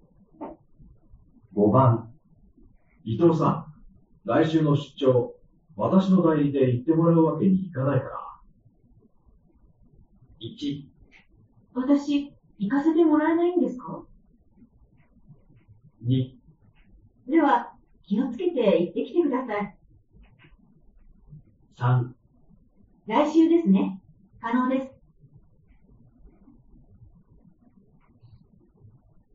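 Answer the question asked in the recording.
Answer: 1: 私、行かせてもらえないんですか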